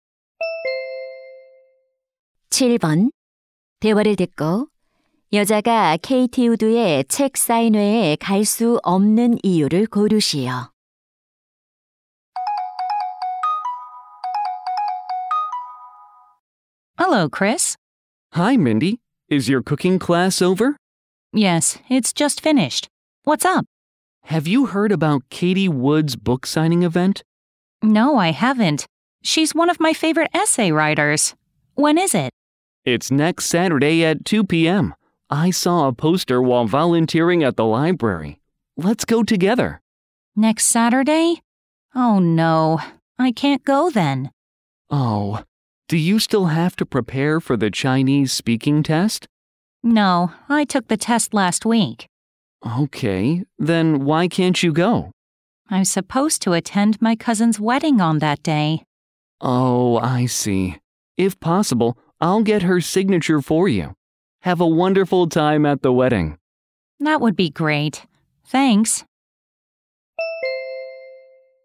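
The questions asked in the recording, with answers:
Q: 대화를 듣고 여자가 KT 우드의 책 사인회에 갈 수 없는 이유를 고르시오.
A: 사촌의 결혼식에 참석해야 해서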